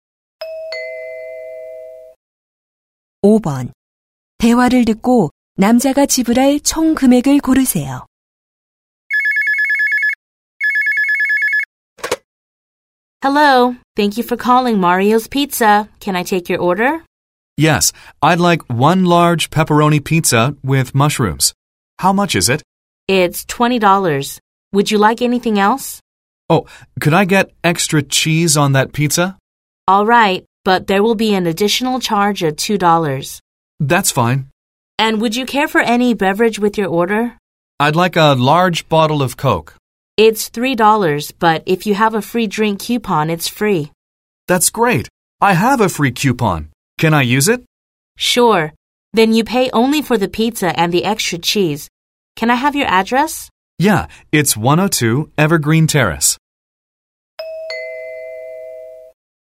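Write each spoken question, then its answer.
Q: 대화를 듣고 남자가 지불할 총 금액을 고르세요.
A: 22달러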